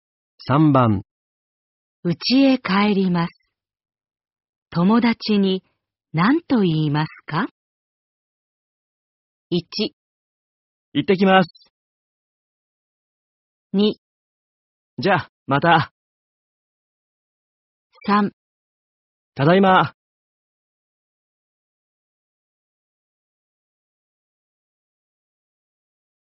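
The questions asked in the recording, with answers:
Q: 家へ帰ります。友達に何と言いますか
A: 2: じゃあ、また。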